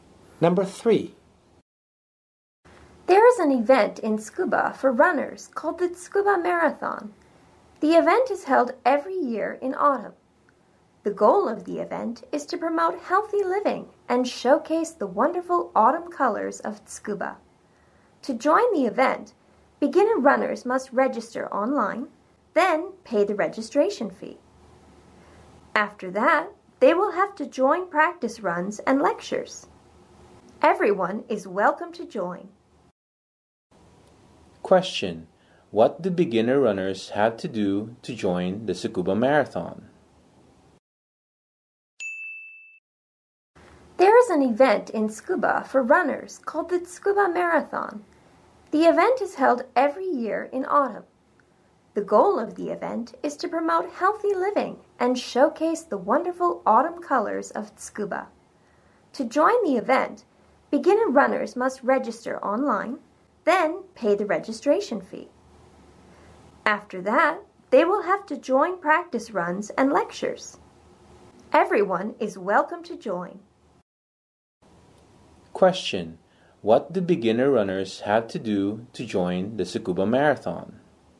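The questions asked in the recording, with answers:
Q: what do beginner runners have to do to join the Tsukuba Marathon?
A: Register online, pay the registration fee, then join practice runs and lectures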